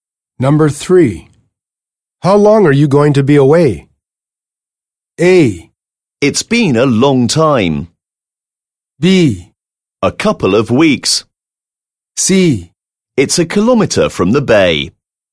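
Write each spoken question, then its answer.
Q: How long are you going to be away?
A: B: A couple of weeks.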